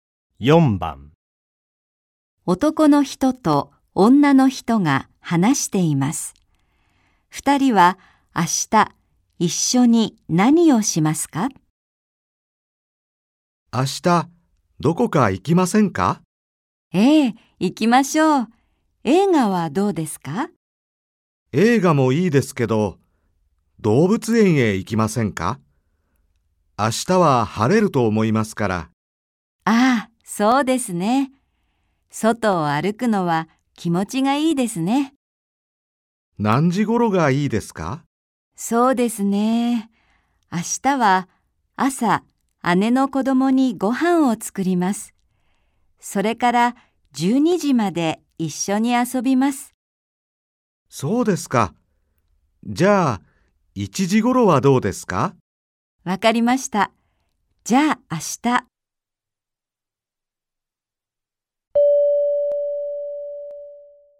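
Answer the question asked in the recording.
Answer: 動物園へ行く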